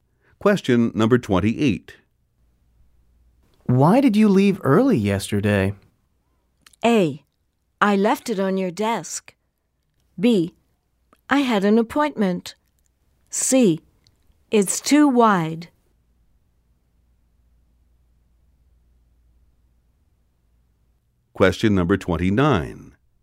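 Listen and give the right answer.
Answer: B: I had an appointment.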